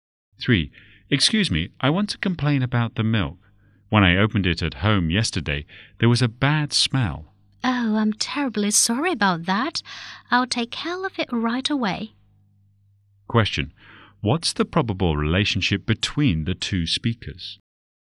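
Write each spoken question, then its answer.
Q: What's the probable relationship between the 2 speakers?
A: Customer and shop assistant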